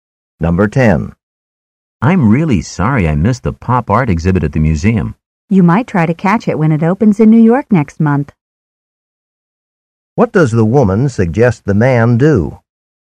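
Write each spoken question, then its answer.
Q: What does the woman suggest the man do?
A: See the exhibit in New York next month.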